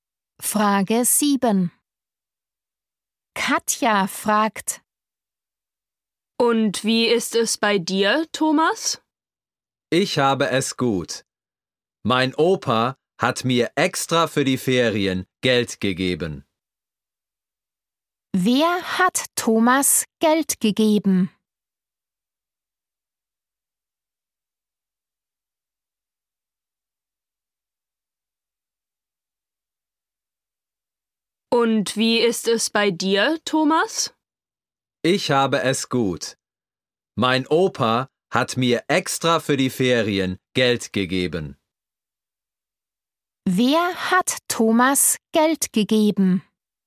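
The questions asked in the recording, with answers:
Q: Wer hat Thomas Geld gegeben?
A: Sein Opa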